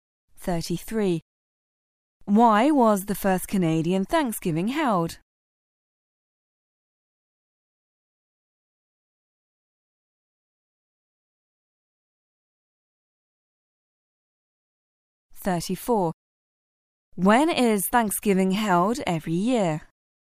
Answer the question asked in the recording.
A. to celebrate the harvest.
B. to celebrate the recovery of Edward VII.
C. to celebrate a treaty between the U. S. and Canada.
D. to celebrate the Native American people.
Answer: B. to celebrate the recovery of Edward VII.

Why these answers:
此题考查同义替换。"include"与"count"关键词同义替换。